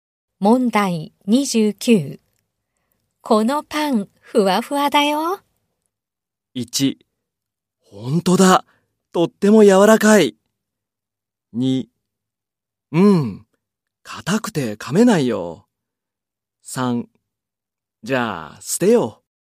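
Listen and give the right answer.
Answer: 1: ほんとだ。とっても柔らかい。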